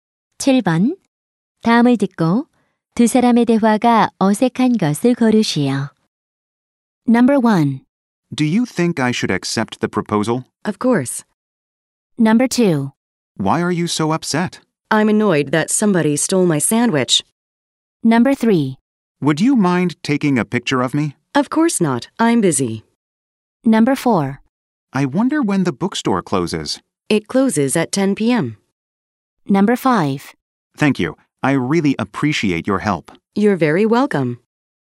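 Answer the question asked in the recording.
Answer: 3번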